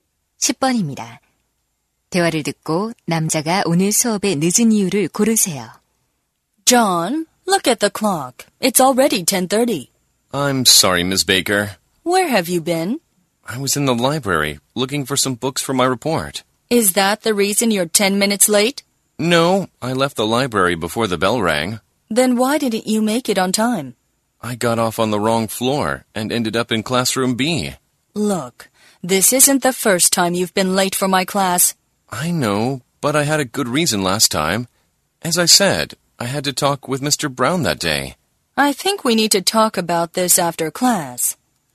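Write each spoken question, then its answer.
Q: 대화를 듣고 남자가 오늘 수업에 늦은 이유를 고르세요.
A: 층을 잘못 내려 다른 교실에 가서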